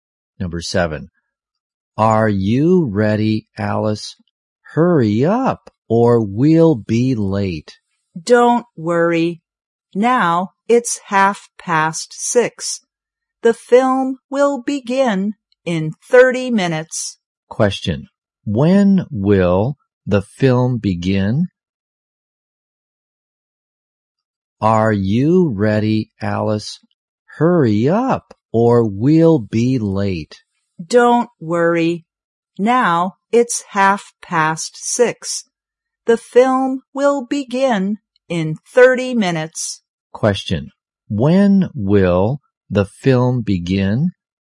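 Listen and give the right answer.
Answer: At 7:00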